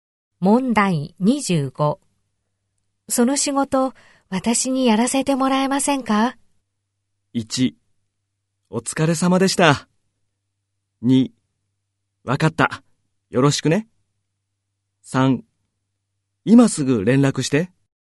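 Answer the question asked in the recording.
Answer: 2: わかった。よろしくね。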